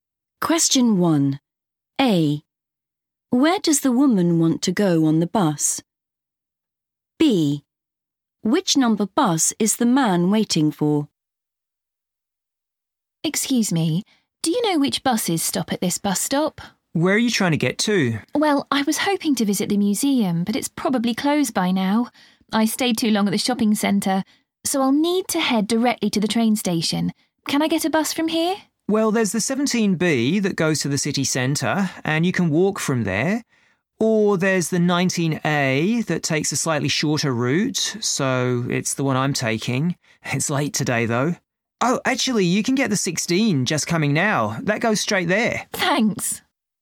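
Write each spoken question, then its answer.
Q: Where does the woman want to go on the bus?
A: the train station

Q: Which number bus is the man waiting for?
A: 19A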